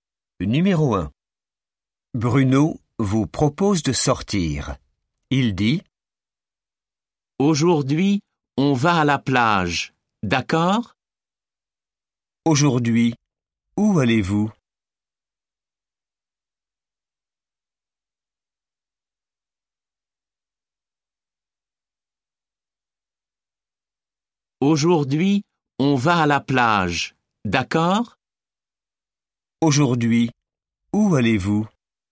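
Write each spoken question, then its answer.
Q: Aujourd'hui, où allez-vous ?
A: à la plage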